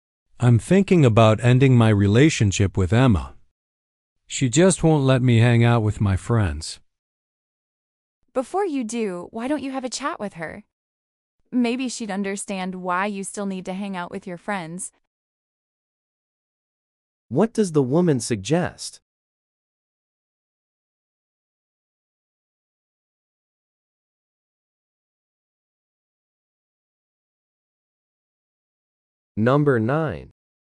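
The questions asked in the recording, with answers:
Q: What does the woman suggest?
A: He should talk with Emma before ending the relationship.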